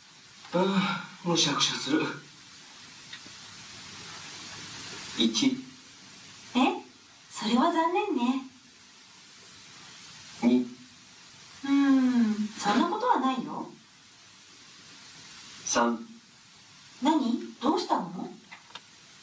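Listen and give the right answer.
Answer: 3: 何?どうしたの?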